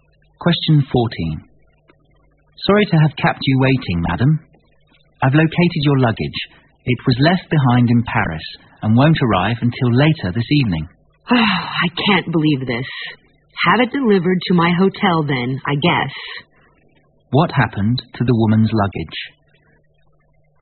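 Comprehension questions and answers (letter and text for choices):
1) What happened to the woman's luggage?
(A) It failed to arrive at its destination in time.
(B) It got seriously damaged on the way.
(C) It got lost at the airport in Paris.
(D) It was left behind in the hotel.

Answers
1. (A) It failed to arrive at its destination in time.

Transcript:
M:Sorry to have kept you waiting, Madam. I've located your luggage. It was left behind in Paris and won't arrive until later this evening.
W:Oh, I can't believe this. Have it deliver to my hotel then , I guess.
Q:What happened to the woman's luggage?

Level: 六级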